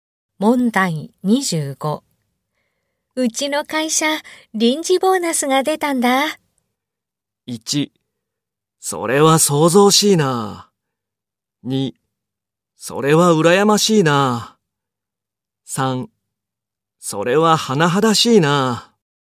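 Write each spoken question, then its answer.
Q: うちの会社、臨時ボーナスが出たんだ。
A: 2: それは羨ましいな。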